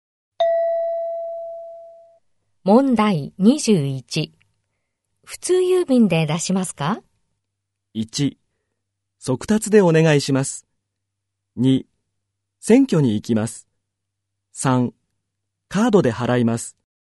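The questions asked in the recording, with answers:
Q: 普通郵便で出しますか?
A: 1: 速達でお願いします。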